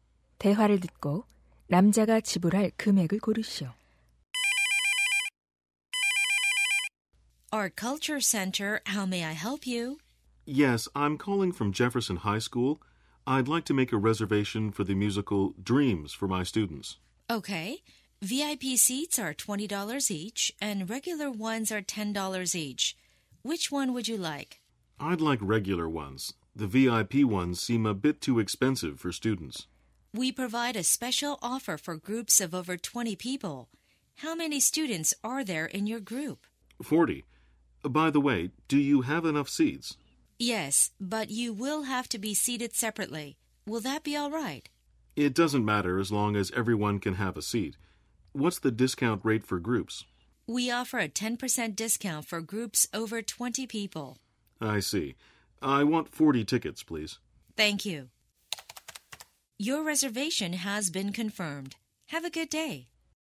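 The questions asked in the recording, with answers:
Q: 대화를 듣고 남자가 지불할 금액을 고르시오.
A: 360달러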